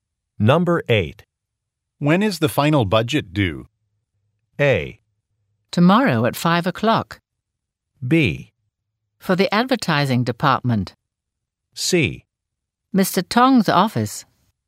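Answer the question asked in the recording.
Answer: A: Tomorrow at 5 o'clock.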